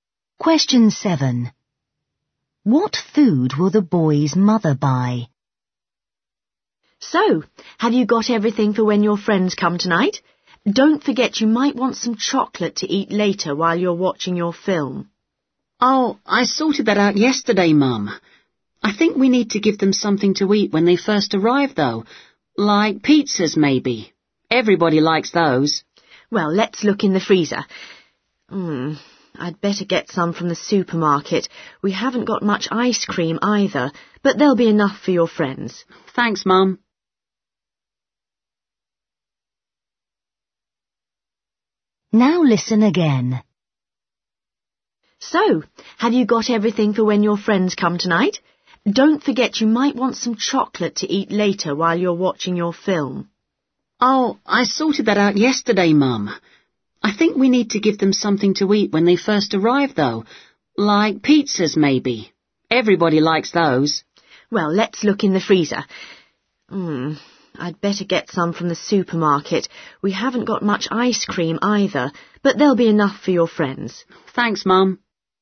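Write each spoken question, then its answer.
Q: What food will the boy's mother buy?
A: pizzas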